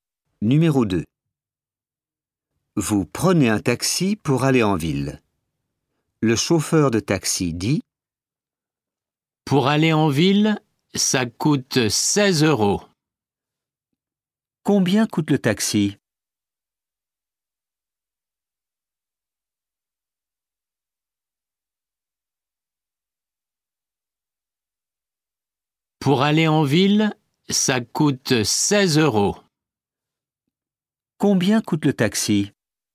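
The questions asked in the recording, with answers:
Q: Combien coûte le taxi?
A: 16 euros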